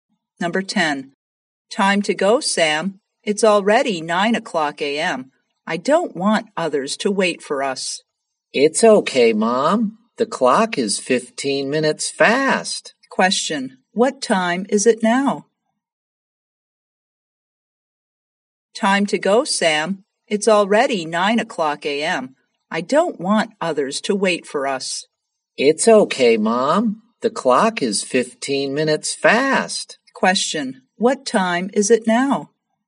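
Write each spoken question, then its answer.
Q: what time is it now?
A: 8:45 a.m.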